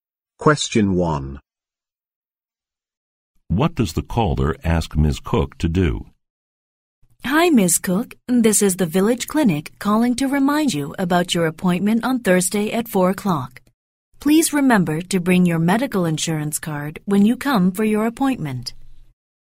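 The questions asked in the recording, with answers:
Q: What does the caller ask Ms. Cook to do?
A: Bring her medical insurance card to her appointment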